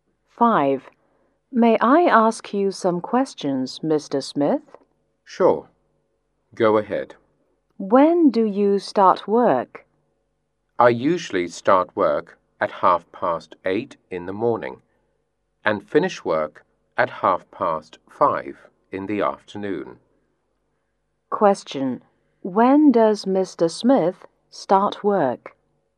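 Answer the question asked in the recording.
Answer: At 8:30 in the morning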